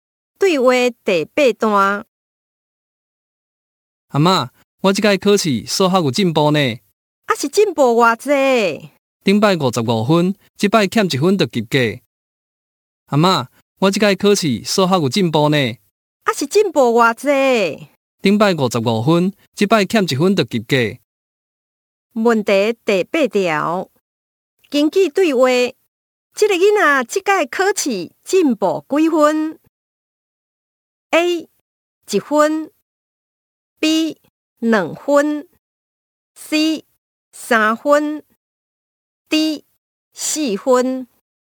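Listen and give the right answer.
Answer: D: 四分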